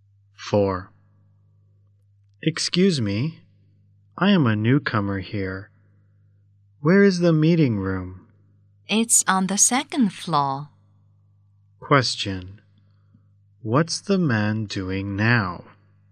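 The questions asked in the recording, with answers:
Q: What's the man doing now?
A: Asking the way to the meeting room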